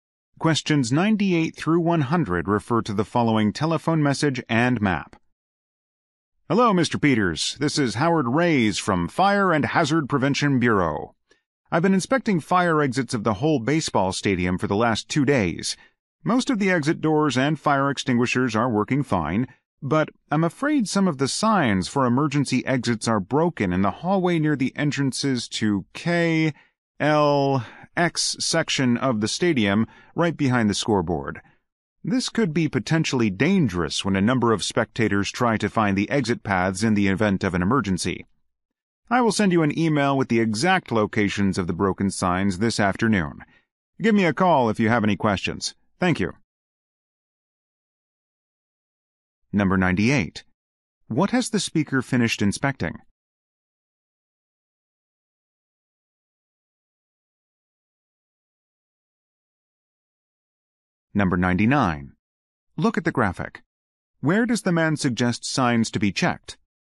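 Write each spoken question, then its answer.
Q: What has the speaker finished inspecting?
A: Fire exits of the baseball stadium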